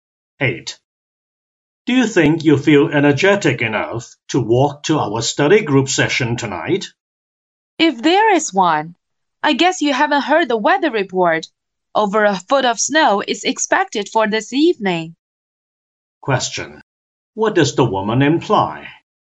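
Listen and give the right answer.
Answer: The study group session may be cancelled because of heavy snow.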